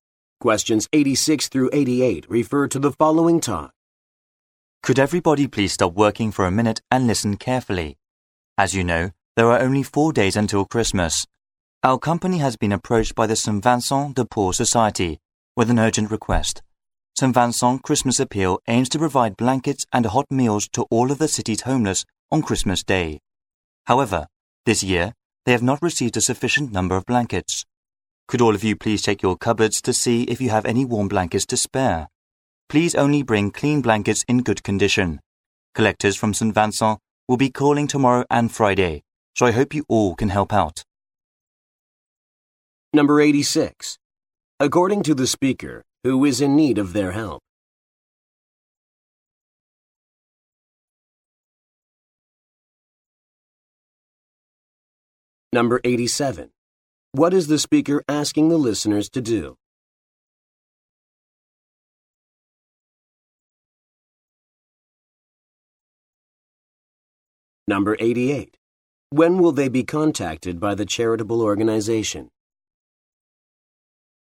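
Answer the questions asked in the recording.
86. The city's homeless
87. Donate clean warm blankets
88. Tomorrow and Friday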